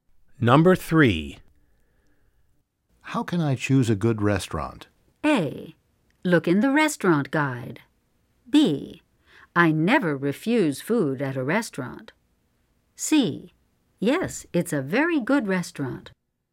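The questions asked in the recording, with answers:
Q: How can I choose a good restaurant?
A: A: Look in the restaurant guide.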